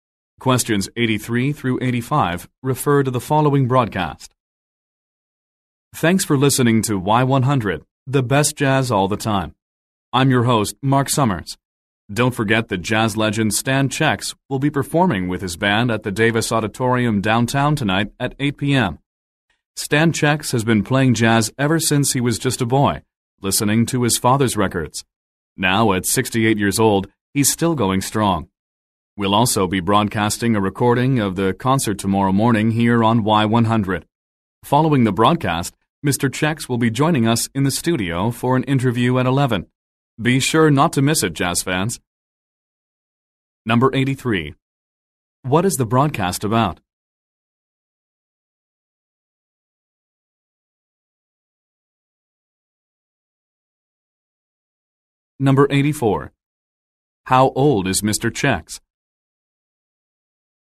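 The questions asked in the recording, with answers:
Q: What is the broadcast about?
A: A jazz concert by Stan Checks

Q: How old is Mr. Checks?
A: 68

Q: When will the interview take place?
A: Tomorrow at 11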